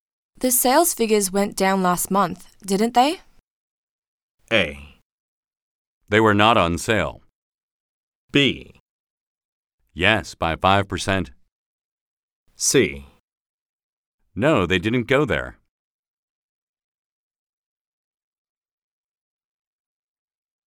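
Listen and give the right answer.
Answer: B: Yes, by 5%.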